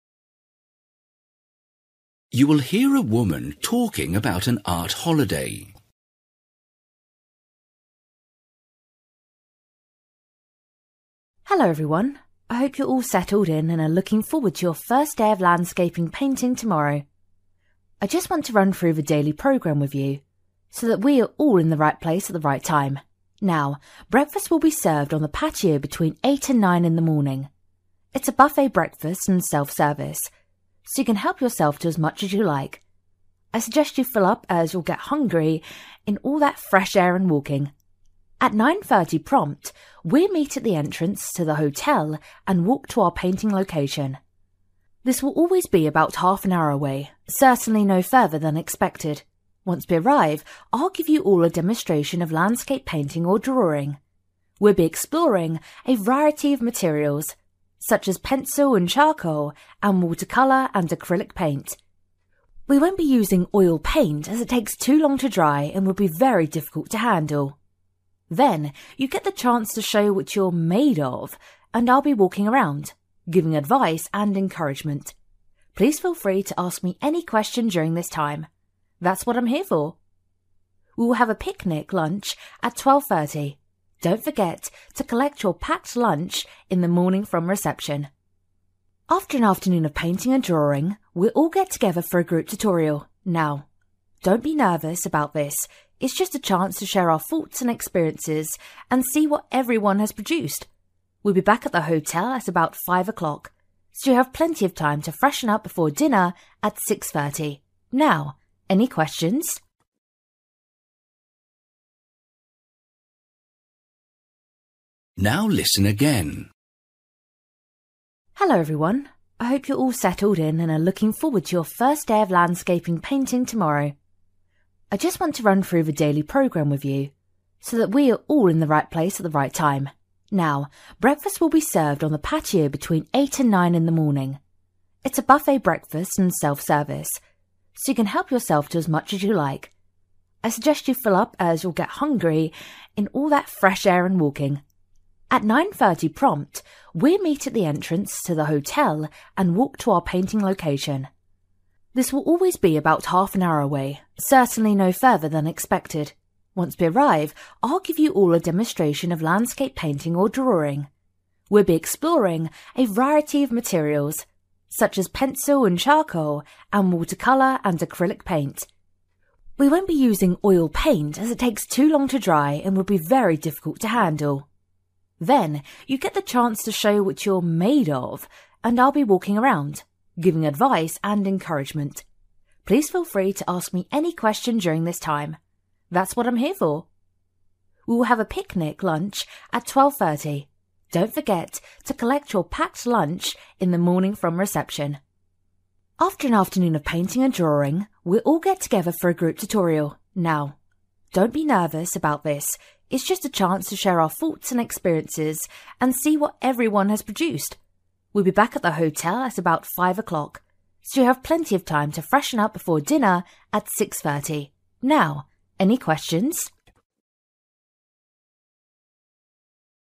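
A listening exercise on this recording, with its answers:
For each question, write the correct answer in the gap. Write one or two words or a number or a date or a time. You will hear a woman talking about an art holiday.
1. From 8 to 9, breakfast will be served on the patio; it's a(n) (1) buffet-style breakfast.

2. At (2) the group will leave the hotel for its painting destination.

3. Once there, the teacher will show her students how to paint a (3) .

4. Different (4) will be used, including charcoal and acrylic paint.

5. A picnic lunch will follow; everyone should get their own from (5) before leaving the hotel.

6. Then a(n) (6) meeting will follow to discuss the day's work.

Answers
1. self-service
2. 9:30
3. landscape
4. materials
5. reception
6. group tutorial

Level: Luyện nghe trình độ B1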